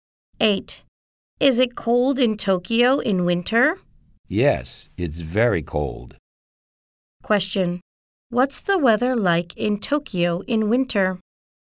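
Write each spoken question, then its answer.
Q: Question. What's the weather like in Tokyo in winter?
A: Very cold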